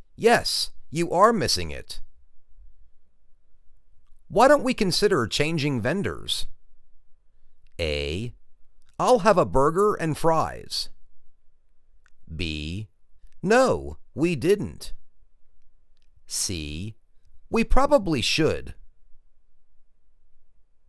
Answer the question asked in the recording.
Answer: We probably should.